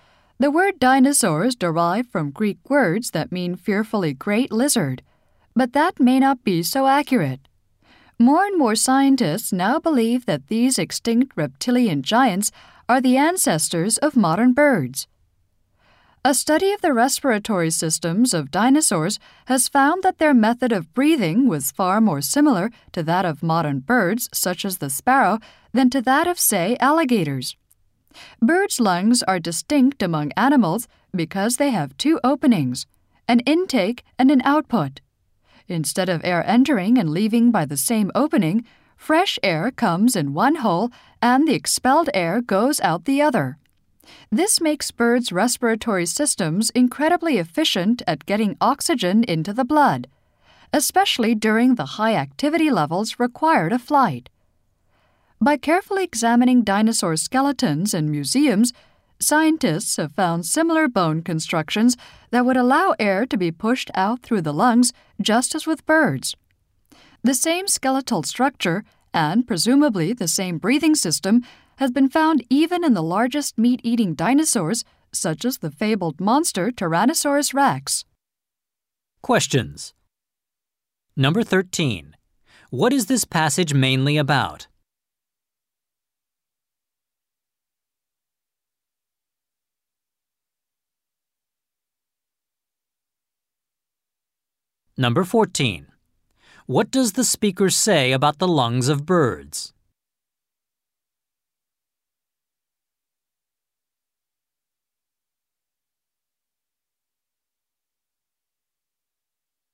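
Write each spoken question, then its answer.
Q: What is this passage mainly about?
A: Dinosaurs' breathing systems were similar to those of birds, suggesting dinosaurs are ancestors of birds

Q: What does the speaker say about the lungs of birds?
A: They have two openings, an intake and an output, making them very efficient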